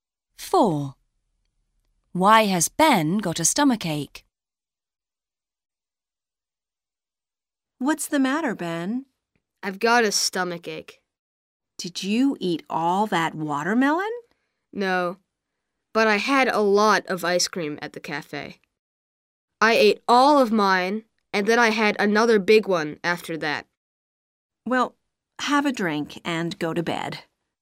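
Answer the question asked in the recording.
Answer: he ate a lot of ice cream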